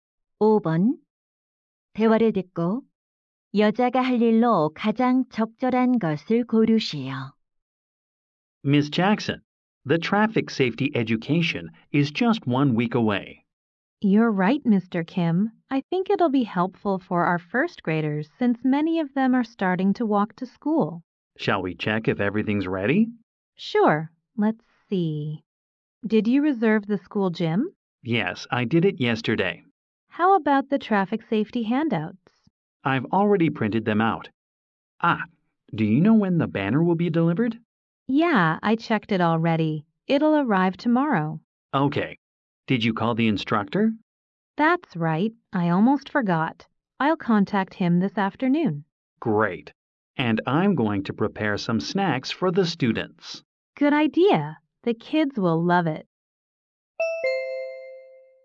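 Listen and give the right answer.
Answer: 강사에게 연락하기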